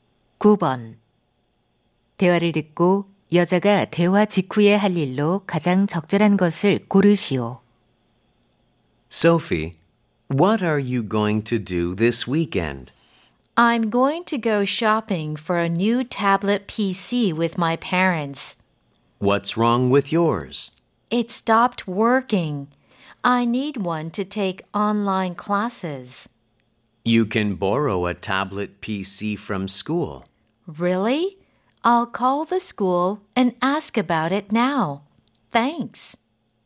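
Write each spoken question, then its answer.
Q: 대화를 듣고 여자가 대화 직후에 할 일로 가장 적절한 것을 고르시오.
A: 학교에 전화하기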